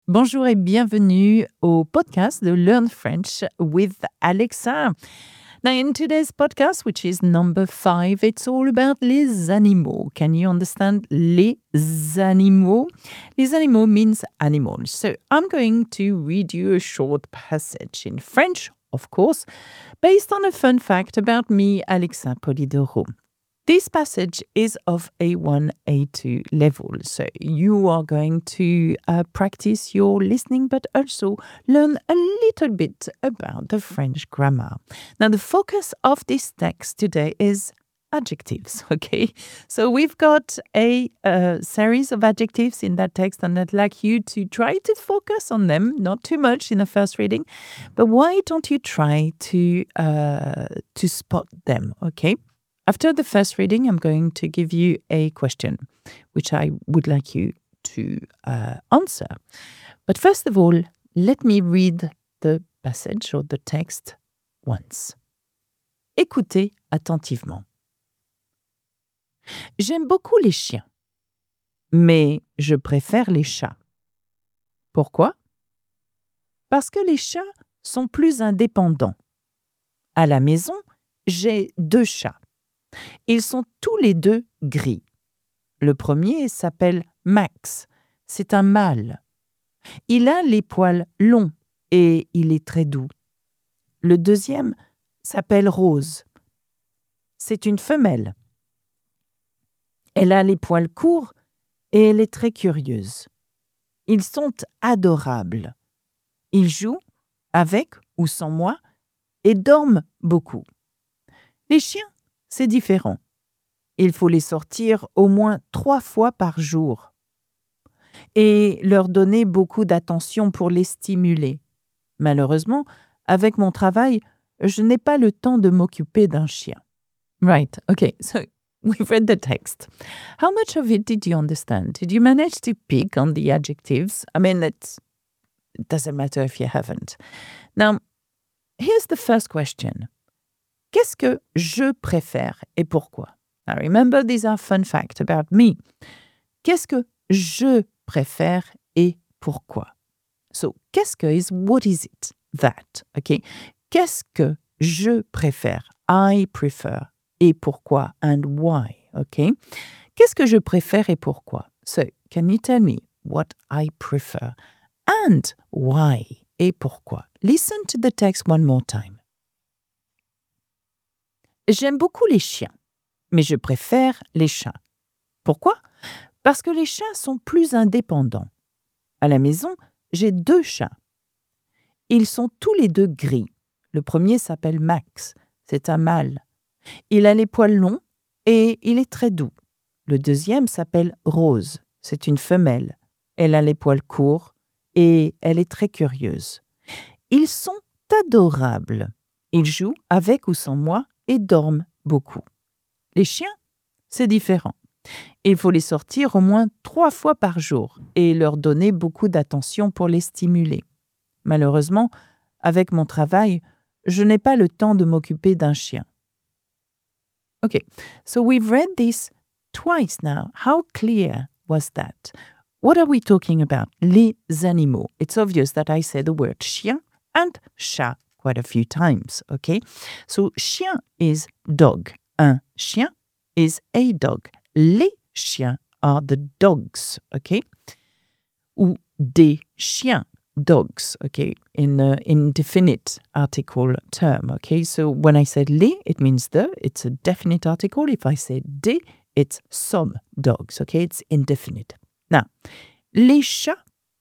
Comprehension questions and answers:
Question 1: Qu'est-ce que je préfère et pourquoi ?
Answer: Les chats, parce qu'ils sont plus indépendants.

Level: A1 - niveau découverte (beginner) / A2 -